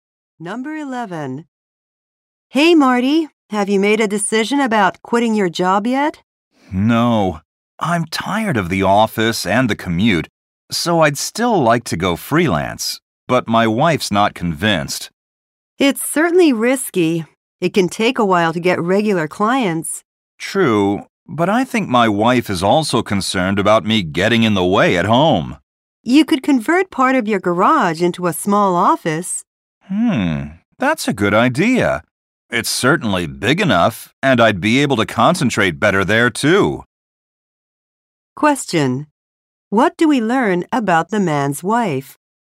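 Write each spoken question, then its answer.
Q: What do we learn about the man's wife?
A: She is worried about him getting in the way at home if he works freelance.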